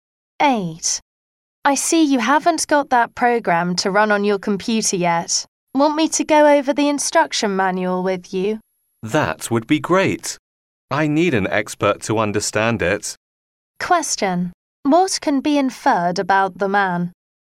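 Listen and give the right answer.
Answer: He finds the instruction manual hard to understand.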